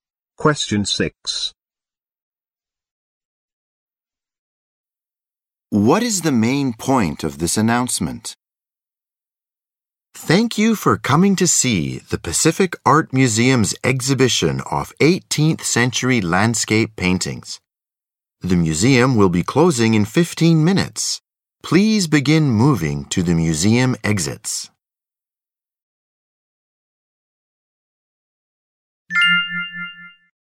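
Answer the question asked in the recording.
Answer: The museum is closing in 15 minutes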